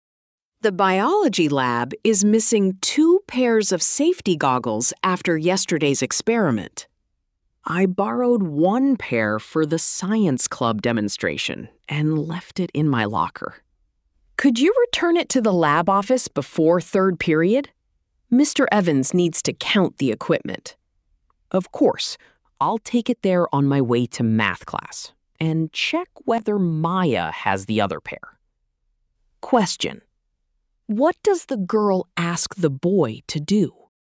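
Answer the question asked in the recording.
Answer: Return the safety goggles to the lab office before 3rd period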